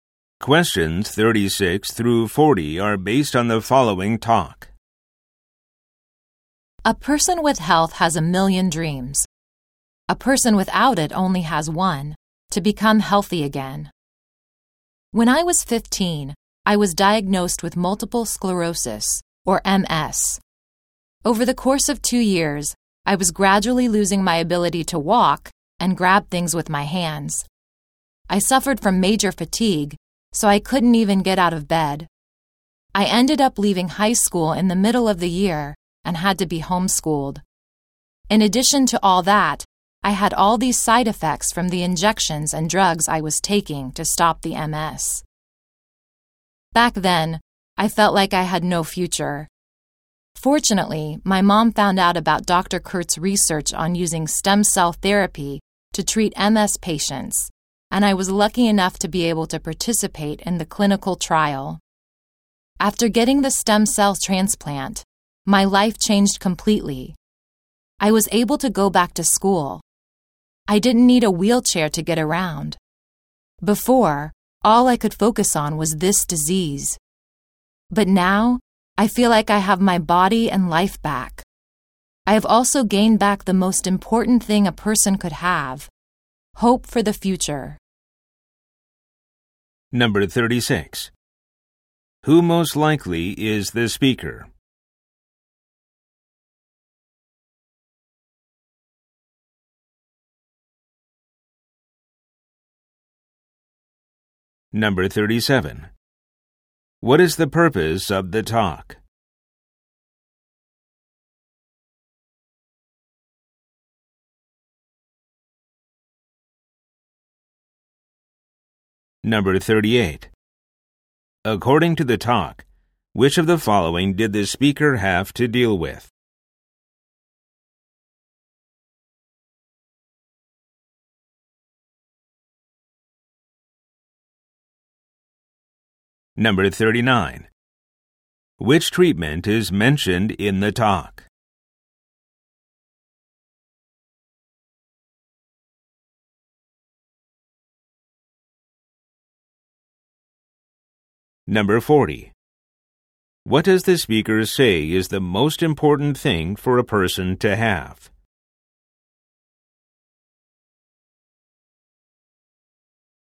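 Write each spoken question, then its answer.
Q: Who most likely is the speaker?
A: A patient with multiple sclerosis who joined a clinical trial

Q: What is the purpose of the talk?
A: To share her experience of recovering from MS through stem cell therapy

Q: Which treatment is mentioned in the talk?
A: Stem cell therapy (stem cell transplant)

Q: What does the speaker say is the most important thing for a person to have?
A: Hope for the future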